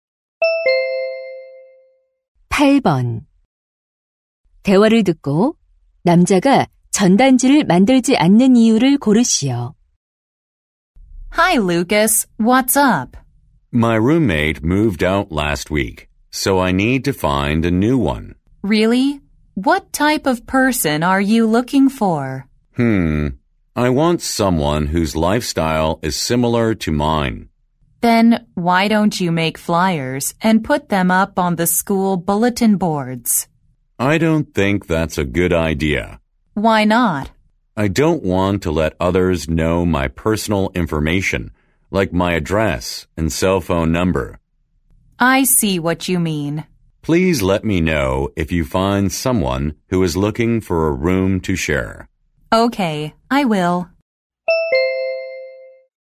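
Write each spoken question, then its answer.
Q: 대화를 듣고 남자가 전단지를 만들지 않는 이유를 고르시오.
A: 개인 정보를 다른 사람들에게 알리고 싶지 않아서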